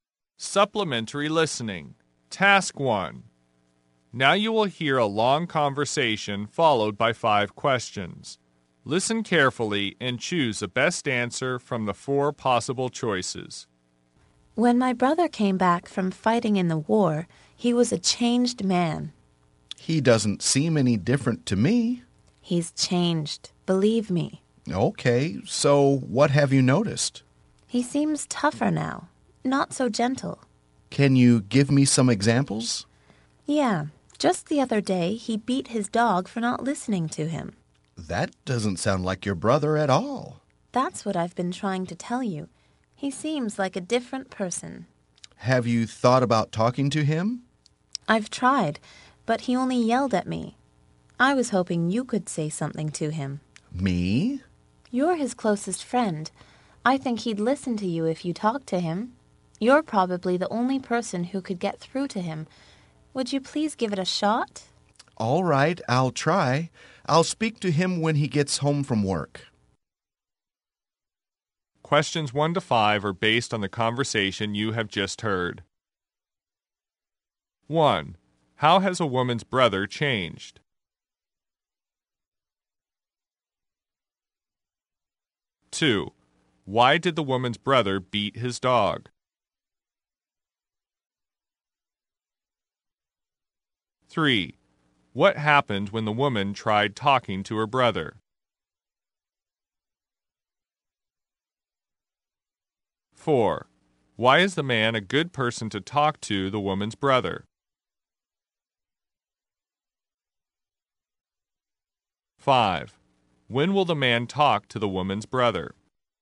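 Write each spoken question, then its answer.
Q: How has a woman's brother changed?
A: He is tougher, not so gentle

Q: Why did the woman's brother beat his dog?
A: For not listening to him

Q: What happened when the woman tried talking to her brother?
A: He yelled at her

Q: Why is the man a good person to talk to the woman's brother?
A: He is his closest friend

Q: When will the man talk to the woman's brother?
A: When he gets home from work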